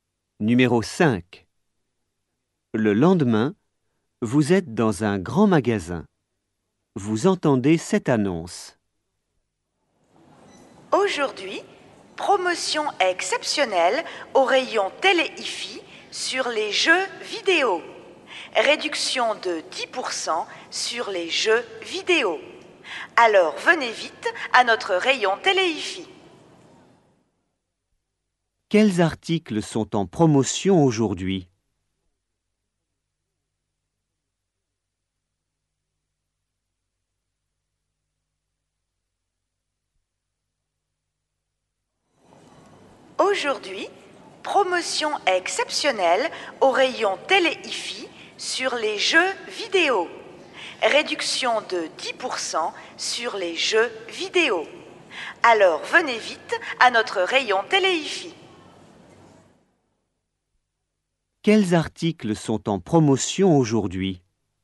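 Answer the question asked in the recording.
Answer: les jeux vidéo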